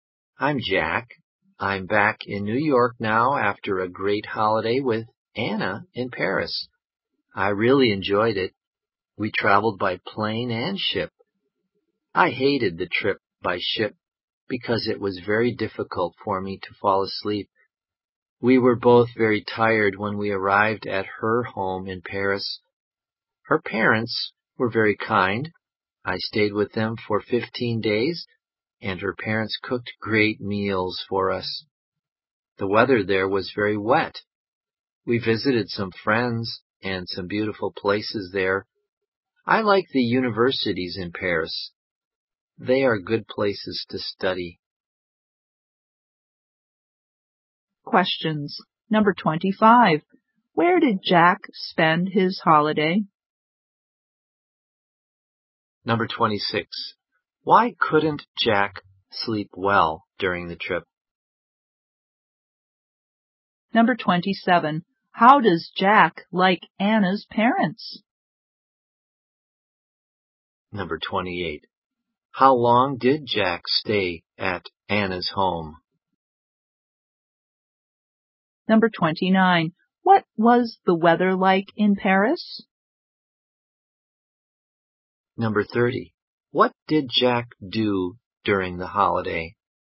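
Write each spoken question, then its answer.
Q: Where did Jack spend his holiday?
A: In Paris

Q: Why couldn't Jack sleep well during the trip?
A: It was hard to fall asleep on the ship

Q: How does Jack like Anna's parents?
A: They were very kind

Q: How long did Jack stay at Anna's home?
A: 15 days

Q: What was the weather like in Paris?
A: Very wet

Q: What did Jack do during the holiday?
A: Visited friends and beautiful places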